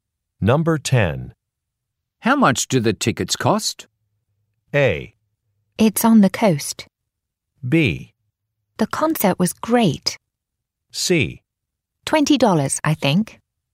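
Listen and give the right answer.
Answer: C: $20, I think.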